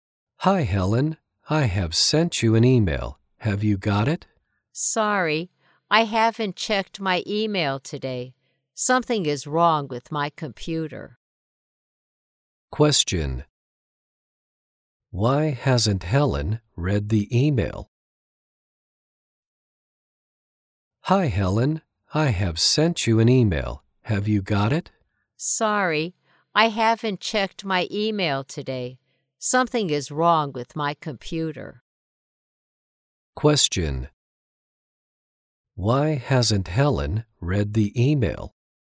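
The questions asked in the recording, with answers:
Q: Why hasn't Helen read the email?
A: Something is wrong with her computer.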